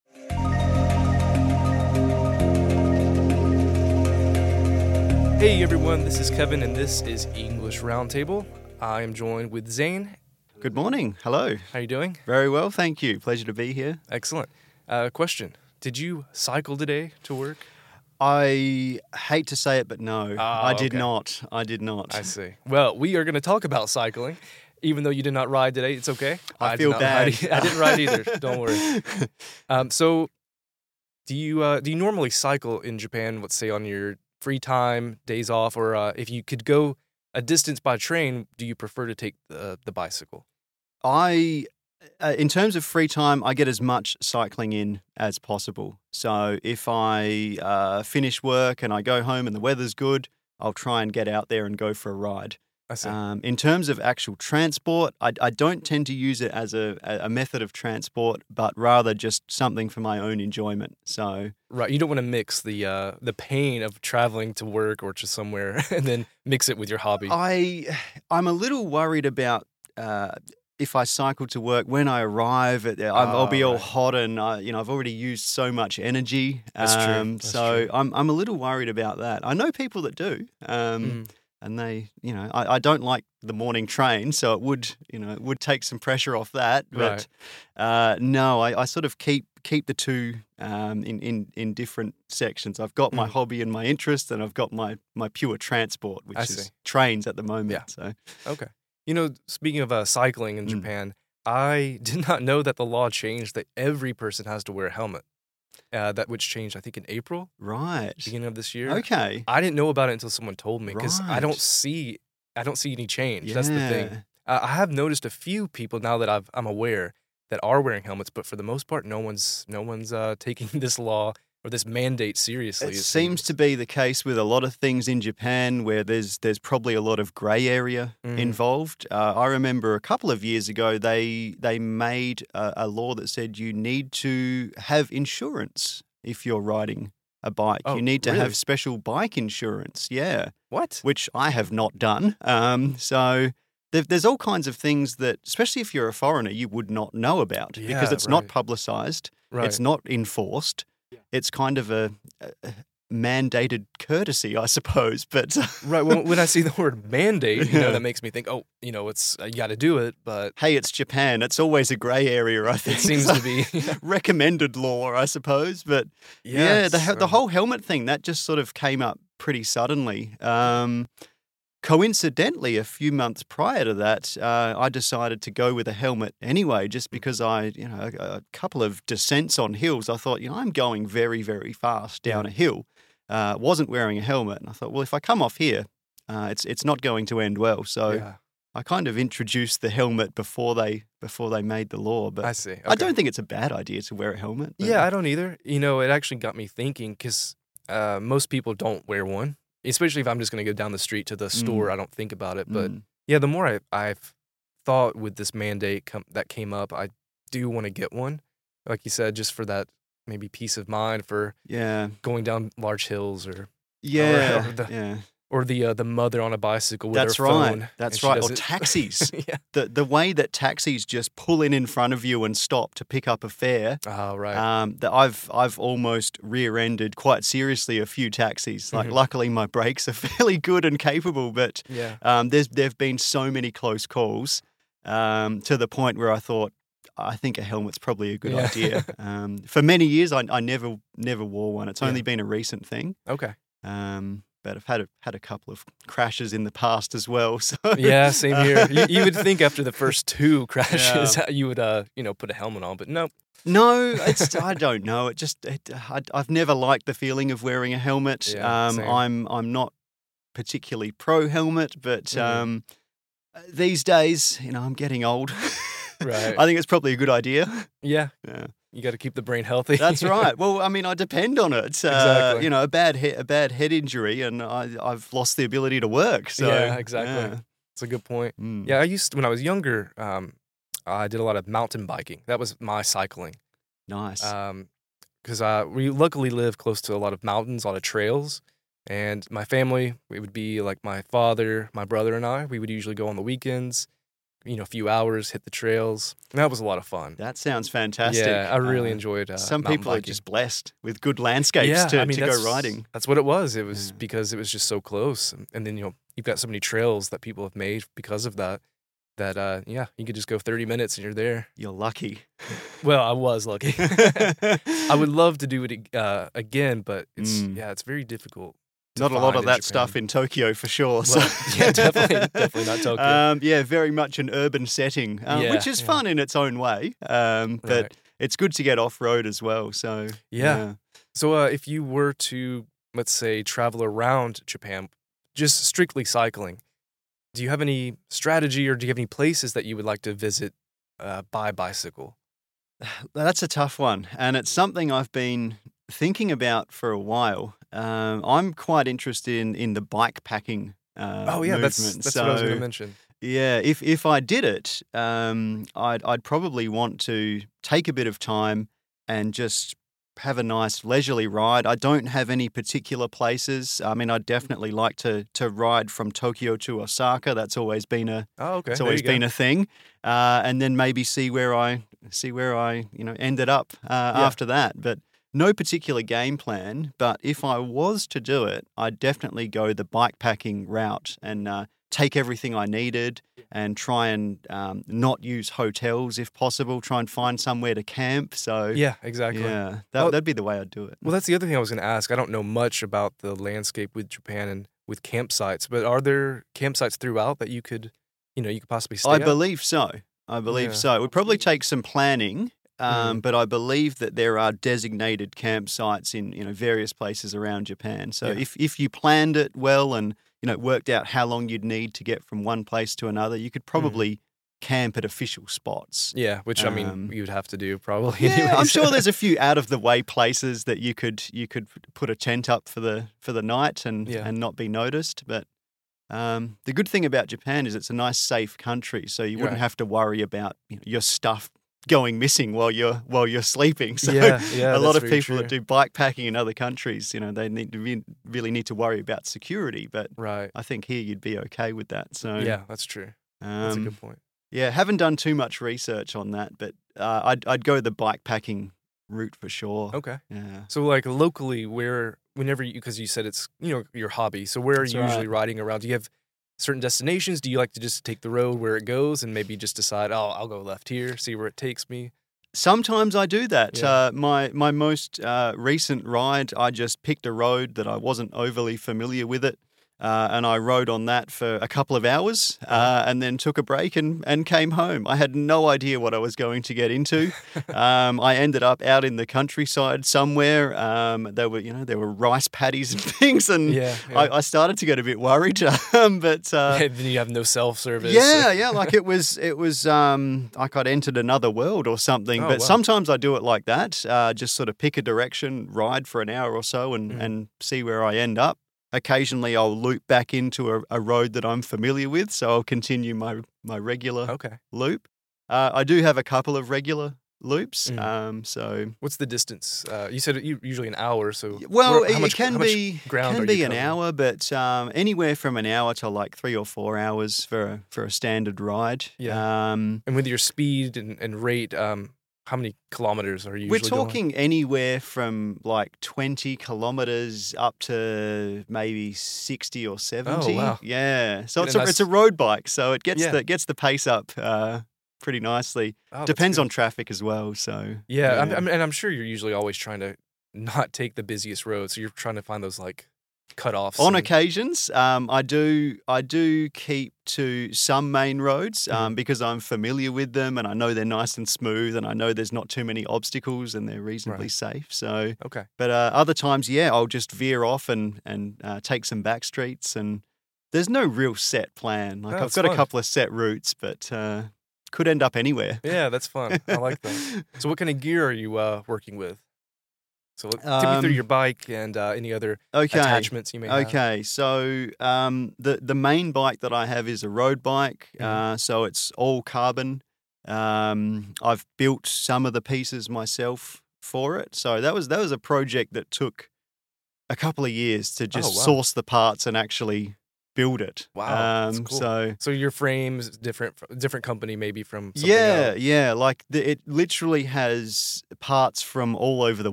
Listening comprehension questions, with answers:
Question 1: What law did Kevin not know about?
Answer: Every person must wear a helmet if they are riding a bicycle.